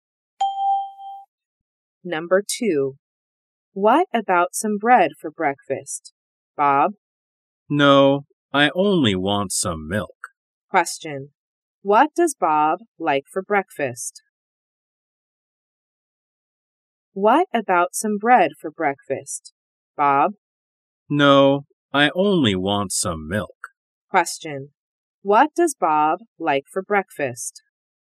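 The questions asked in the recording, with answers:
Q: What does Bob like for breakfast?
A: Some milk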